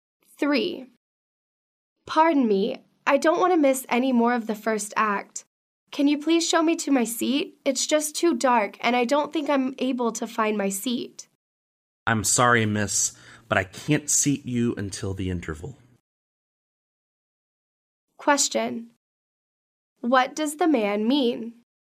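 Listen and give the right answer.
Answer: The woman has to wait until the interval to be seated.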